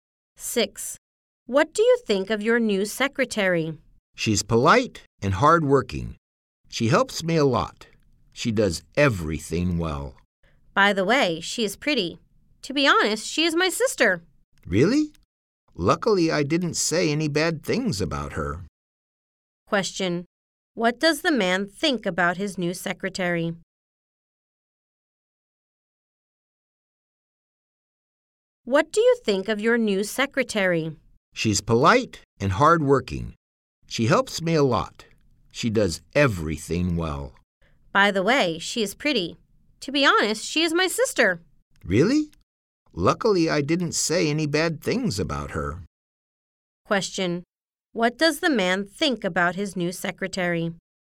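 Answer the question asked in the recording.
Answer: She is polite, hardworking and pretty.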